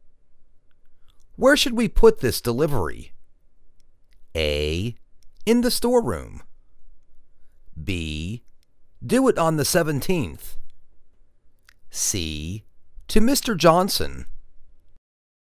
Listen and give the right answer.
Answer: In the storeroom.